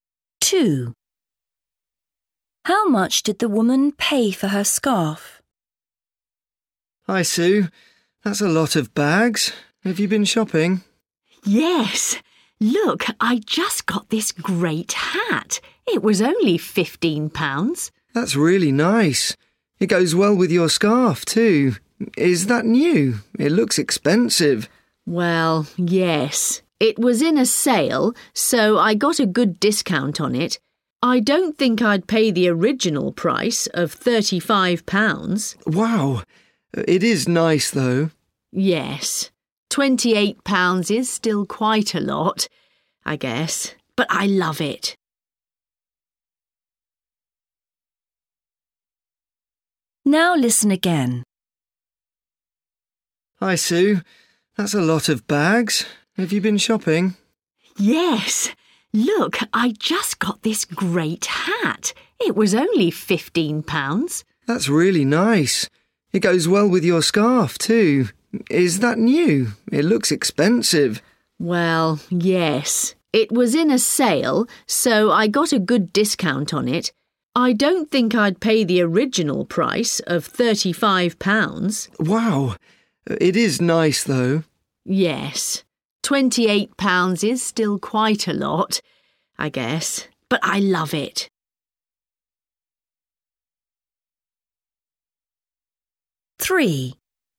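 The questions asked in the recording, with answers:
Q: How much did the woman pay for her scarf?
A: £28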